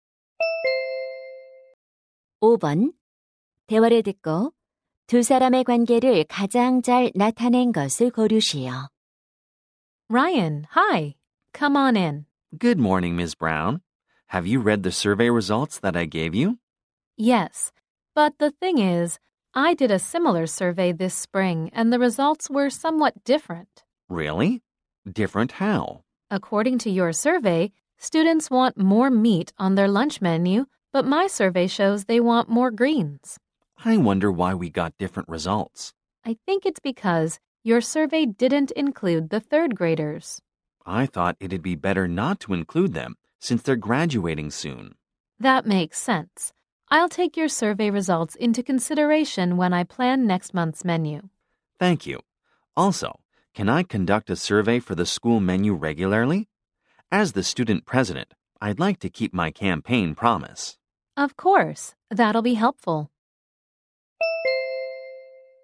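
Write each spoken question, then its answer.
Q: 대화를 듣고 두 사람의 관계를 가장 잘 나타낸 것을 고르시오.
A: 영양사 - 학생회장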